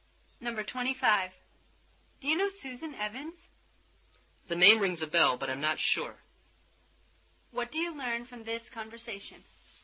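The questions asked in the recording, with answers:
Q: What do you learn from this conversation?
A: The name sounds familiar, but the man isn't sure he knows Susan Evans.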